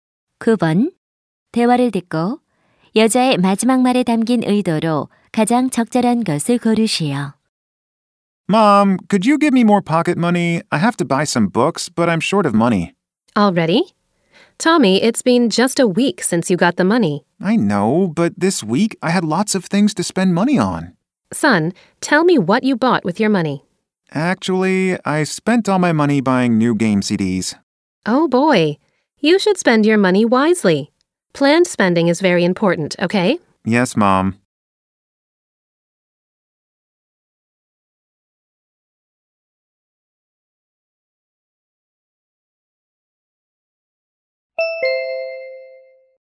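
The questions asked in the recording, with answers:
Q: 대화를 듣고 여자의 마지막 말에 담긴 의도로 가장 적절한 것을 고르시오.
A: 충고 (돈을 계획적으로 쓰라는 충고)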